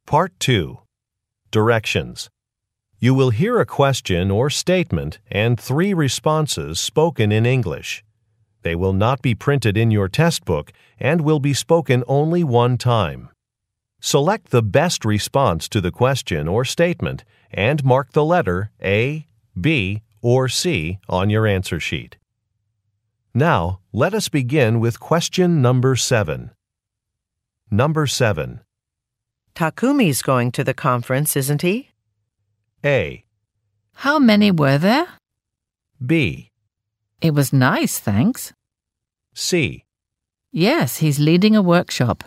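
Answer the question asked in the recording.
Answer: Yes, he's leading a workshop.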